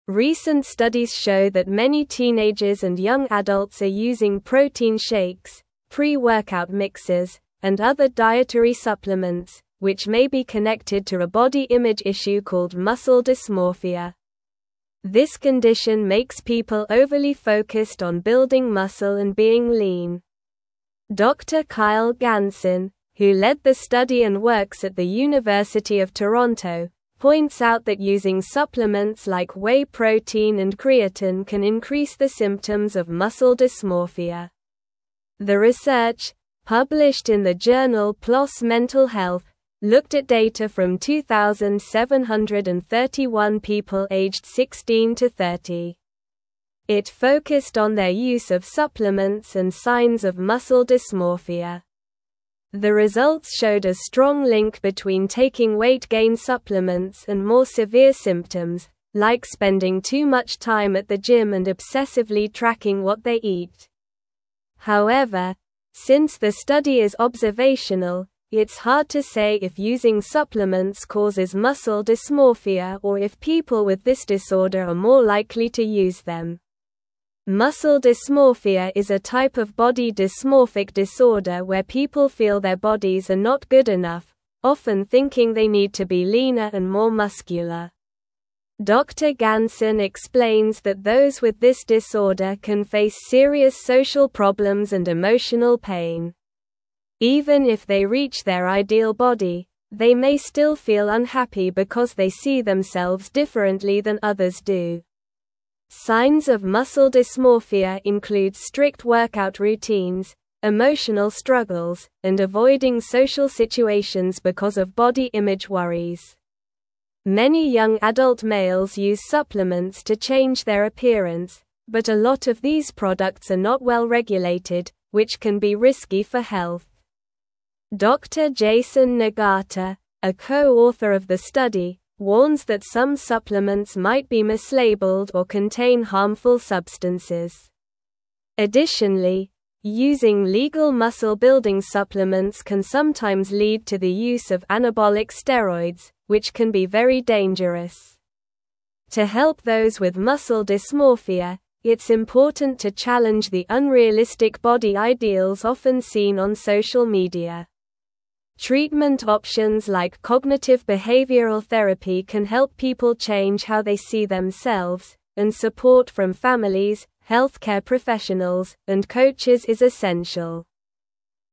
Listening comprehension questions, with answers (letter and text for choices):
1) What condition is linked to the use of protein shakes and dietary supplements among young people?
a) Anorexia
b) Bulimia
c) Muscle dysmorphia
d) Obesity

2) Who led the study on muscle dysmorphia and dietary supplement use?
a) Dr. Kyle Ganson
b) Dr. Jason Nagata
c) Dr. John Smith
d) Dr. Emily White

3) What age group was the focus of the research on muscle dysmorphia?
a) 16 to 30 years old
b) 12 to 18 years old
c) 20 to 35 years old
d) 25 to 40 years old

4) What is a common sign of muscle dysmorphia?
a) Excessive eating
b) Lack of exercise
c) Strict workout routines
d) Frequent socializing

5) What type of therapy can help people with muscle dysmorphia change their self-perception?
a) Physical therapy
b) Cognitive behavioral therapy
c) Occupational therapy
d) Art therapy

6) What warning did Dr. Jason Nagata give regarding dietary supplements?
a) They are always safe to use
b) They are only effective for older adults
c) They have no side effects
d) They may be mislabeled or contain harmful substances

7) What can using legal muscle-building supplements sometimes lead to?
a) Improved mental health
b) The use of anabolic steroids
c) Better social skills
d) Increased flexibility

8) What is an important step in helping those with muscle dysmorphia?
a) Ignoring their concerns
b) Encouraging them to work out more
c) Promoting extreme dieting methods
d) Challenging unrealistic body ideals on social media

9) Recent studies show that many teenagers and young adults are using protein shakes, pre-workout mixes, and (1)______ dietary (2)______, which may be connected to a body image issue called muscle dysmorphia.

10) Recent studies show that many teenagers and young adults are using protein shakes, pre-workout mixes, and (1)______ dietary (2)______, which may be connected to a body image issue called muscle dysmorphia.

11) This condition makes people overly (3)______ on building muscle and being lean.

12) The research, published in the journal PLOS Mental Health, (4)______ at data from 2,731 people aged 16 to 30.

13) It focused on their use of supplements and (5)______ of muscle dysmorphia.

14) The results showed a strong link between (6)______ weight-gain supplements and more severe symptoms, like spending too much time at the gym and obsessively tracking what they eat.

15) However, since the study is observational, it's hard to say if using supplements causes muscle dysmorphia or if (7)______ with this disorder are more likely to use them.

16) (8)______ dysmorphia is a type of body dysmorphic disorder where people feel their bodies are not good enough, often thinking they need to be leaner and more muscular.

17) Signs of muscle (9)______ include (10)______ workout routines, emotional struggles, and (11)______ social (12)______ because of body image worries.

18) Signs of muscle (9)______ include (10)______ workout routines, emotional struggles, and (11)______ social (12)______ because of body image worries.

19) Signs of muscle (9)______ include (10)______ workout routines, emotional struggles, and (11)______ social (12)______ because of body image worries.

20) Signs of muscle (9)______ include (10)______ workout routines, emotional struggles, and (11)______ social (12)______ because of body image worries.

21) Additionally, using legal muscle-building supplements can sometimes lead to the use of (13)______ steroids, which can be very dangerous.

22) To help those with muscle dysmorphia, it's (14)______ to challenge the (15)______ body ideals often seen on social media.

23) To help those with muscle dysmorphia, it's (14)______ to challenge the (15)______ body ideals often seen on social media.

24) Treatment (16)______ like cognitive behavioral therapy can help people change how they see themselves, and support from families, healthcare professionals, and coaches is essential.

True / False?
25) Not many teenagers and young adults are using protein shakes and other dietary supplements.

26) Dr. Kyle Ganson led a study at the University of Toronto about muscle dysmorphia and supplement use.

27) Some supplements may be mislabeled or contain harmful substances, according to Dr. Jason Nagata.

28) Muscle dysmorphia is a condition where people are overly focused on being muscular and lean.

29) Many young adult males use supplements to improve their appearance, but these products can be risky for health.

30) Muscle dysmorphia usually doesn't lead to emotional pain or social problems for those who have it.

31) The research found a weak connection between taking weight-gain supplements and severe muscle dysmorphia symptoms.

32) Treatment options like medication therapy can help people with muscle dysmorphia change their self-image.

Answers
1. c) Muscle dysmorphia
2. a) Dr. Kyle Ganson
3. a) 16 to 30 years old
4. c) Strict workout routines
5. b) Cognitive behavioral therapy
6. d) They may be mislabeled or contain harmful substances
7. b) The use of anabolic steroids
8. d) Challenging unrealistic body ideals on social media
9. other
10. supplements
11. focused
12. looked
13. signs
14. taking
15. people
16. Muscle
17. dysmorphia
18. strict
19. avoiding
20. situations
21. anabolic
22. important
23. unrealistic
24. options
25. False
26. True
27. True
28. True
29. True
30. False
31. False
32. False

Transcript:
Recent studies show that many teenagers and young adults are using protein shakes, pre-workout mixes, and other dietary supplements, which may be connected to a body image issue called muscle dysmorphia. This condition makes people overly focused on building muscle and being lean. Dr. Kyle Ganson, who led the study and works at the University of Toronto, points out that using supplements like whey protein and creatine can increase the symptoms of muscle dysmorphia.
The research, published in the journal PLOS Mental Health, looked at data from 2,731 people aged 16 to 30. It focused on their use of supplements and signs of muscle dysmorphia. The results showed a strong link between taking weight-gain supplements and more severe symptoms, like spending too much time at the gym and obsessively tracking what they eat. However, since the study is observational, it's hard to say if using supplements causes muscle dysmorphia or if people with this disorder are more likely to use them.
Muscle dysmorphia is a type of body dysmorphic disorder where people feel their bodies are not good enough, often thinking they need to be leaner and more muscular. Dr. Ganson explains that those with this disorder can face serious social problems and emotional pain. Even if they reach their ideal body, they may still feel unhappy because they see themselves differently than others do. Signs of muscle dysmorphia include strict workout routines, emotional struggles, and avoiding social situations because of body image worries.
Many young adult males use supplements to change their appearance, but a lot of these products are not well regulated, which can be risky for health. Dr. Jason Nagata, a co-author of the study, warns that some supplements might be mislabeled or contain harmful substances. Additionally, using legal muscle-building supplements can sometimes lead to the use of anabolic steroids, which can be very dangerous. To help those with muscle dysmorphia, it's important to challenge the unrealistic body ideals often seen on social media. Treatment options like cognitive behavioral therapy can help people change how they see themselves, and support from families, healthcare professionals, and coaches is essential.

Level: Level 3